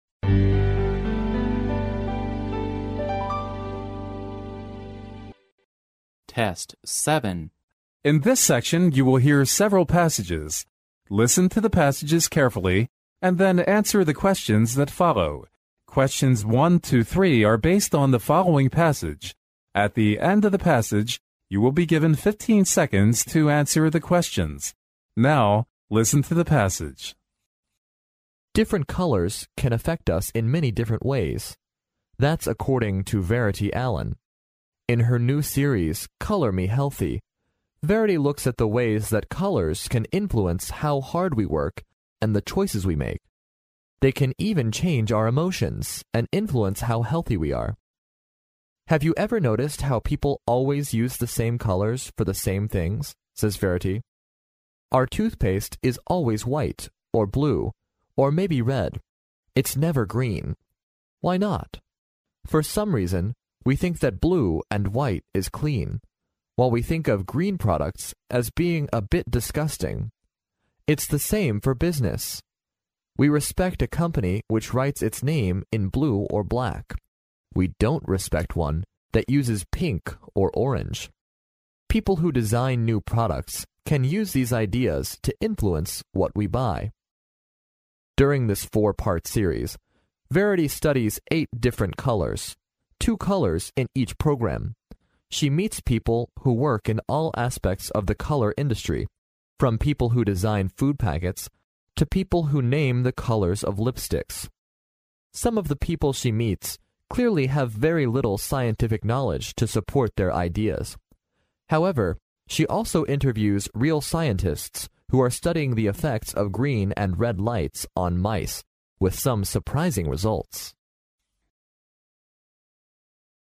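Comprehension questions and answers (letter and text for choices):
Now,listen to the passage.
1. In Verity's new series Color Me Healthy,she looks at the ways_____.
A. people work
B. people make choices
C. people stay healthy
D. colors influence people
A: D. colors influence people

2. According to Verity, why is the toothpaste never green?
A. Because green products are regarded to be a bit disgusting.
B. Because green products are hard to be recognized.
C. Because green products are not respected by most people.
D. Because green products are not designed by color industries.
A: A. Because green products are regarded to be a bit disgusting.

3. According to Verity, people respect a company which writes its name in______.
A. pink or orange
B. purple or orange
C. black or green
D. black or blue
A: D. black or blue

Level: 英语四级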